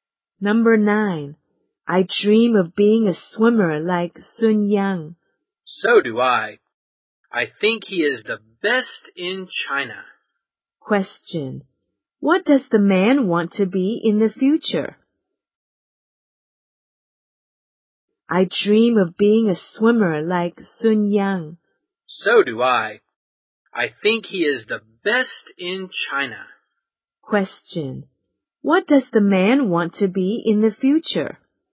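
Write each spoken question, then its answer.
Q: What does the man want to be in the future?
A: A swimmer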